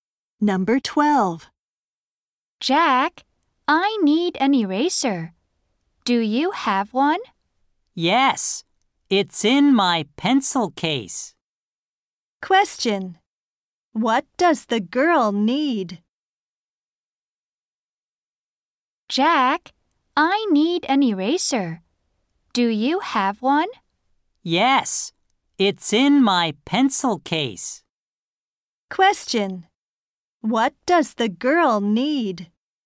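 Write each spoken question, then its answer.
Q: Question. What does the girl need?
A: An eraser.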